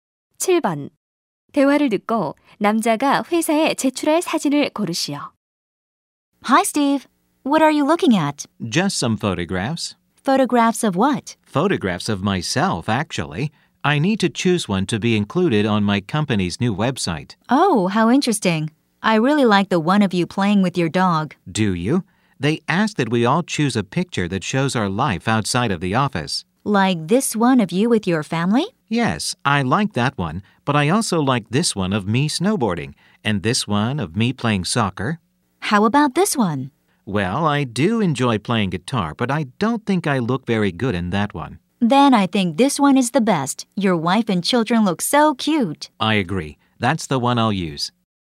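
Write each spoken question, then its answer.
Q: 대화를 듣고 남자가 회사에 제출할 사진을 고르시오.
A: 가족과 함께 있는 사진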